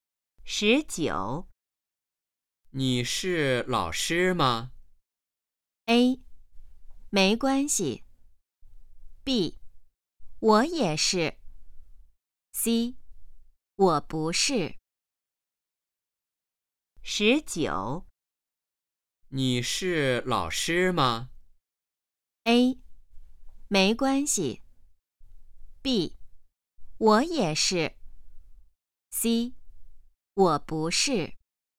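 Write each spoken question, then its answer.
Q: 你是老师吗?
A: C: 我不是。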